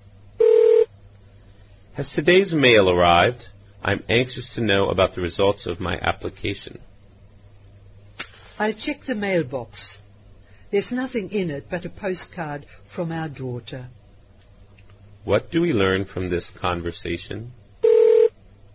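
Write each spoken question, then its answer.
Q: What do we learn from this conversation?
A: The application results haven't arrived yet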